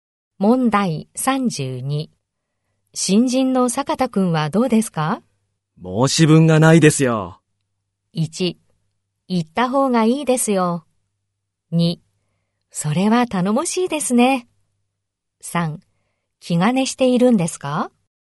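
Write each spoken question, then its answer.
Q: 新人の坂田くんはどうですか?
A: 2: それは頼もしいですね。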